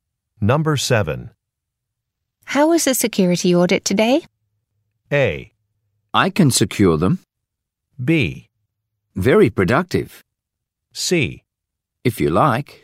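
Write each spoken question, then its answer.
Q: How is the security audit today?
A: B: Very productive.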